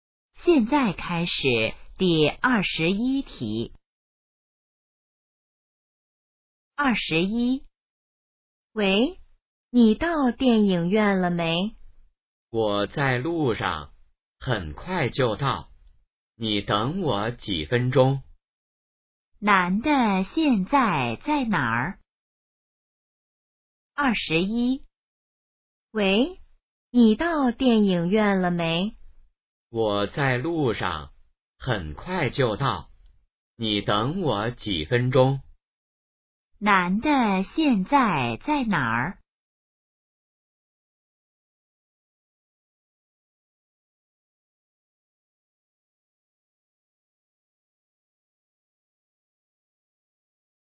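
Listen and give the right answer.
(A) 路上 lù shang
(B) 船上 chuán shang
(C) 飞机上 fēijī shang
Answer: (A) 路上 lù shang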